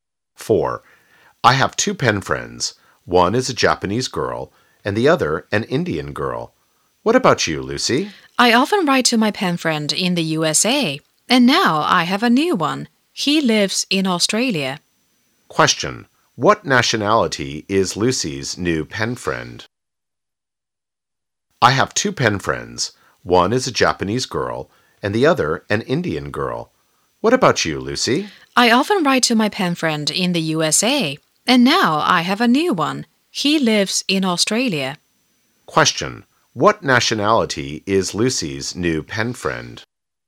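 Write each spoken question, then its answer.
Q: What nationality is Lucy's new pen friend?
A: Australian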